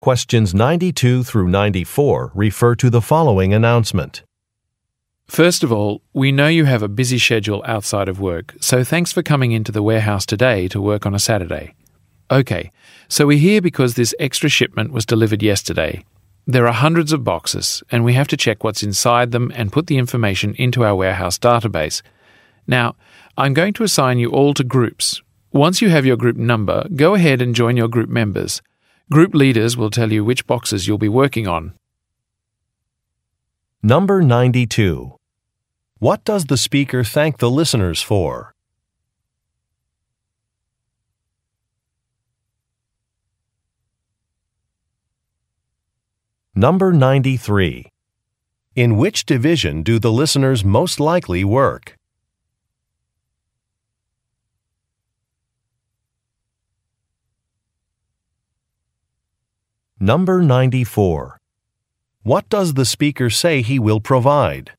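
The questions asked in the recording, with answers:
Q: What does the speaker thank the listeners for?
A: Coming in to work on a Saturday

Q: In which division do the listeners most likely work?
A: The warehouse

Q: What does the speaker say he will provide?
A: Group assignments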